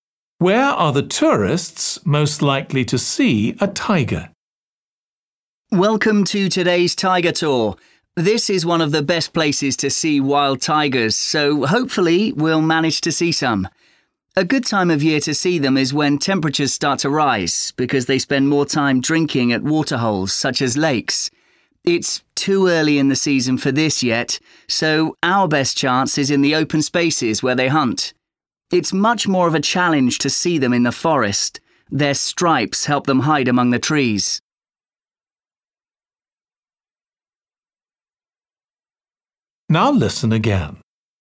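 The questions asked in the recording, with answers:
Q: Where are the tourists most likely to see a tiger?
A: in the open spaces where they hunt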